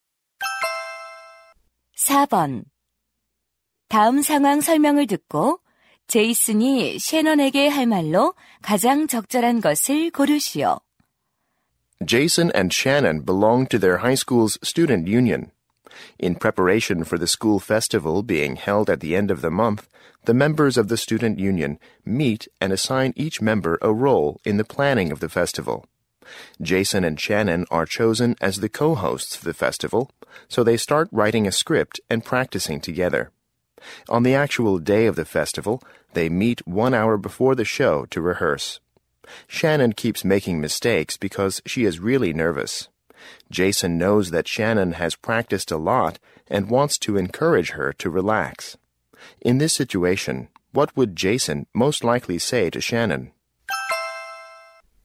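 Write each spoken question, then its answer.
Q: In this situation, what would Jason most likely say to Shannon?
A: Relax, you've practiced a lot, so you'll do fine.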